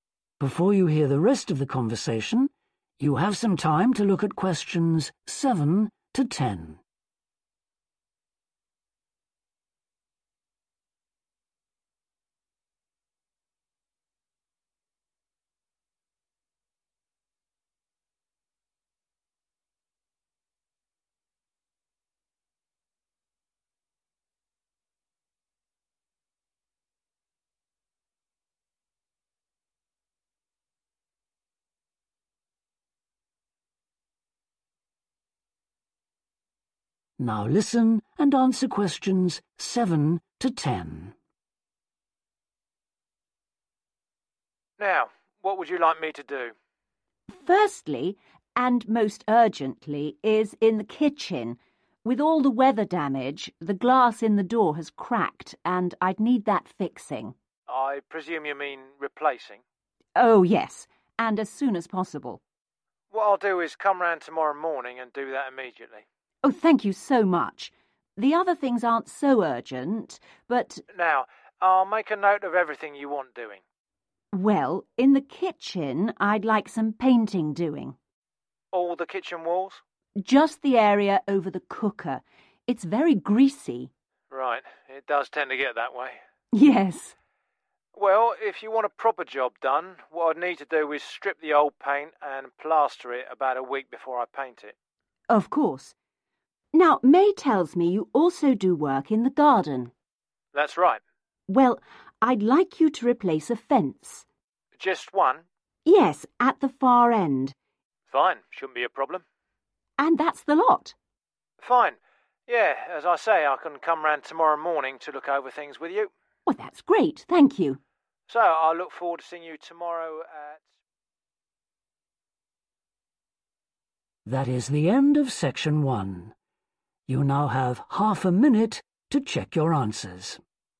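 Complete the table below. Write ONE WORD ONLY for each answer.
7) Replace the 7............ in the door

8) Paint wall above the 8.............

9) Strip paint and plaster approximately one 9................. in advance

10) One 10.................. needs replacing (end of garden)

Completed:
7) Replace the glass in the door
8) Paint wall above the cooker
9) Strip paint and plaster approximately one week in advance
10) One fence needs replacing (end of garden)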